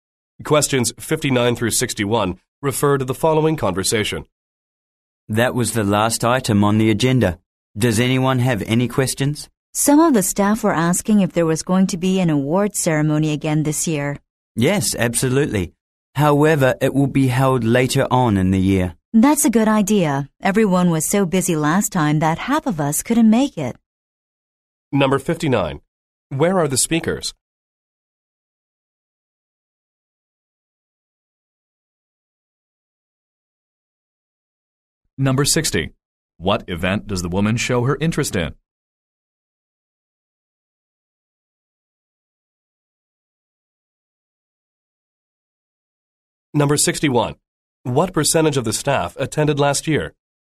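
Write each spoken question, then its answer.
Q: Where are the speakers?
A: At a meeting

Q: What event does the woman show her interest in?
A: The award ceremony

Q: What percentage of the staff attended last year?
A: About 50 percent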